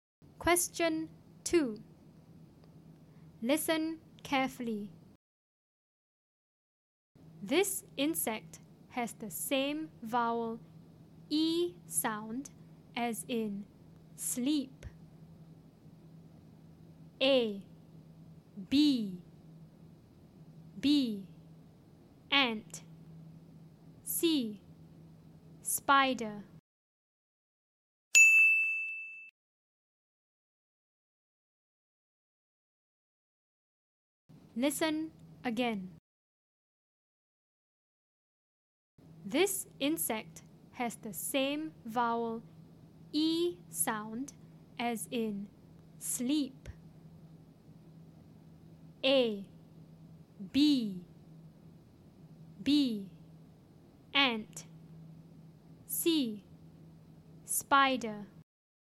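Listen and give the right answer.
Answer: A: bee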